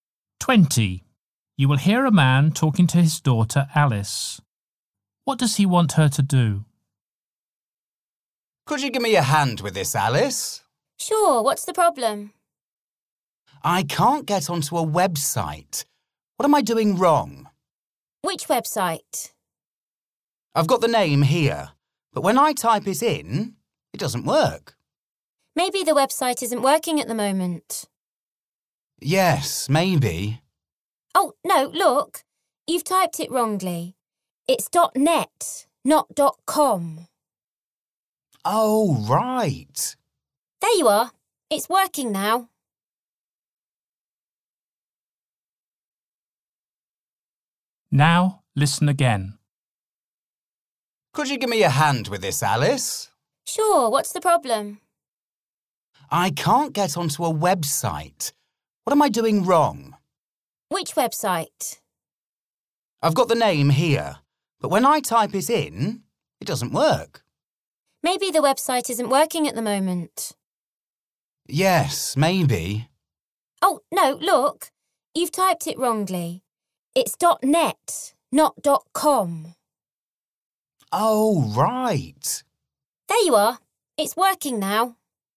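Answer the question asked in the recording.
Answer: Help him get onto a website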